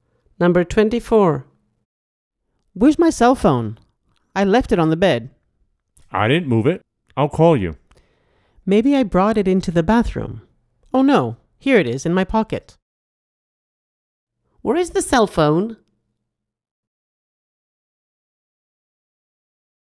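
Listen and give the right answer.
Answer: In her pocket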